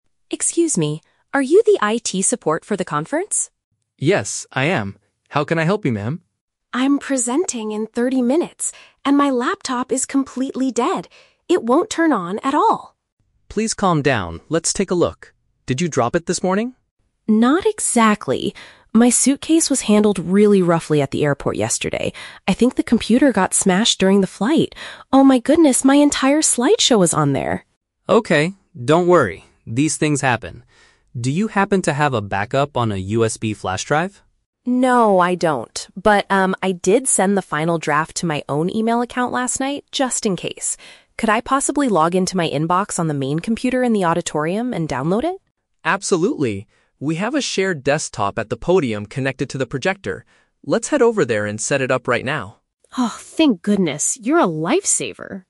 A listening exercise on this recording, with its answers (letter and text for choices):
Listen to the conversation between a speaker and an event technician. Choose the correct answer (A, B, or C) for each question.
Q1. Why is the woman so panicked?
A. Her computer is not working just before her speech.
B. She lost her suitcase at the airport yesterday.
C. She forgot her presentation notes at the hotel.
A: A. Her computer is not working just before her speech.

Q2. What likely caused the issue with her device?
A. She accidentally dropped it on the floor this morning.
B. A software virus suddenly deleted all her files.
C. It was damaged while she was traveling by plane.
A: C. It was damaged while she was traveling by plane.

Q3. How will they solve the problem?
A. By copying the presentation from her flash drive.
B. By getting the document from the internet on a different machine.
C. By replacing the broken battery in her laptop.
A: B. By getting the document from the internet on a different machine.

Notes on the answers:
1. The woman says she is "presenting in 30 minutes" and her laptop is "completely dead." This means her computer is broken right before her talk. Why the trap is wrong: Option (B) is the trap. The audio mentions her "suitcase at the airport", but she didn't lose it; it was just handled roughly. Option (C) is plausible but not mentioned.
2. She believes the computer "got smashed during the flight" because her suitcase was handled roughly. This is paraphrased as being damaged while traveling. Why the trap is wrong: Option (A) is the trap. The technician asks, "Did you drop it?" but the woman replies "Not exactly", meaning she did not drop it herself. Option (B) is not mentioned.
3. The woman suggests logging into her "email account" on the "main computer in the auditorium" to download the file, and the technician agrees. Why the trap is wrong: Option (A) is the trap. The technician asks if she has a "USB flash drive", but she says "No, I don't." Option (C) is a logical technical fix in real life, but it is not discussed in the audio.

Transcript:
Speaker: Excuse me! Are you the IT support for the conference?
Technician: Yes, I am. How can I help you, ma'am?
Speaker: I'm presenting in 30 minutes, and my laptop is completely dead! It won't turn on at all.
Technician: Please calm down, let's take a look. Did you drop it this morning?
Speaker: Not exactly. My suitcase was handled really roughly at the airport yesterday. I think the computer got smashed during the flight. Oh my goodness, my entire slideshow is on there!
Technician: Okay, don't worry. These things happen. Do you happen to have a backup on a USB flash drive?
Speaker: No, I don't. But, um, I did send the final draft to my own email account last night, just in case. Could I possibly log into my inbox on the main computer in the auditorium and download it?
Technician: Absolutely. We have a shared desktop at the podium connected to the projector.